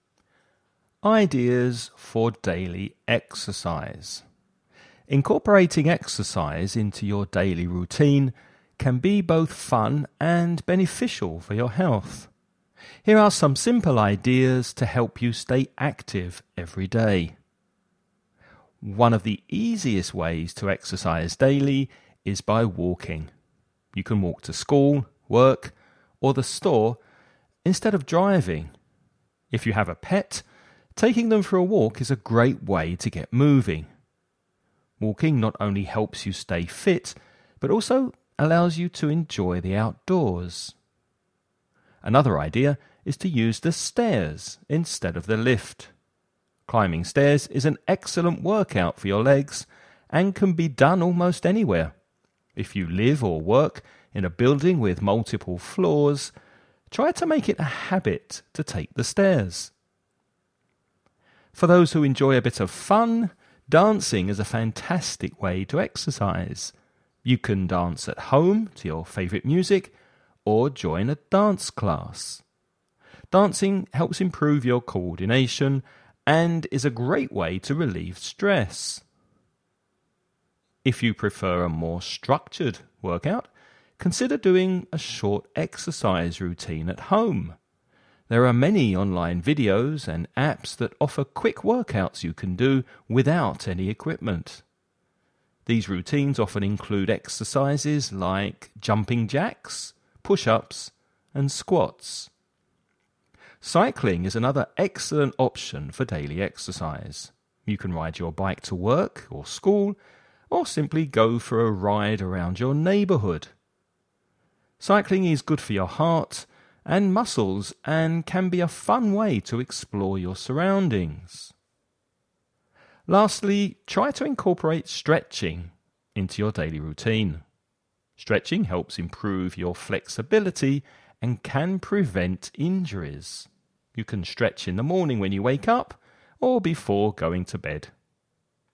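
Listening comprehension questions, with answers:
You're going to listen to a man talking about taking daily exercise. Before you listen, read the following questions.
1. What is one of the easiest ways to exercise daily mentioned in the text?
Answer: Walking

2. How can taking the stairs benefit you?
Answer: It is an excellent workout for your legs and can be done almost anywhere.

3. What are two benefits of dancing as a form of exercise?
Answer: It improves your coordination and relieves stress.

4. What type of exercises might be included in a short home workout routine?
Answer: Jumping jacks, push-ups and squats.

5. Why is cycling a good option for daily exercise?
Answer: It is good for your heart and muscles and a fun way to explore your surroundings.

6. When is a good time to incorporate stretching into your routine?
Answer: In the morning when you wake up or before going to bed.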